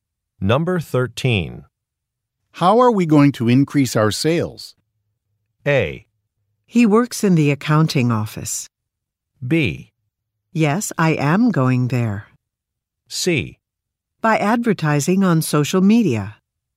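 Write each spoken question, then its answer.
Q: How are we going to increase our sales?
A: C: By advertising on social media.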